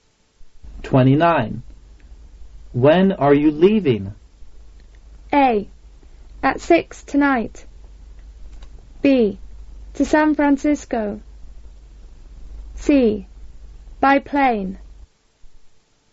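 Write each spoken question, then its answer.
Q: When are you leaving?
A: A: At 6 tonight.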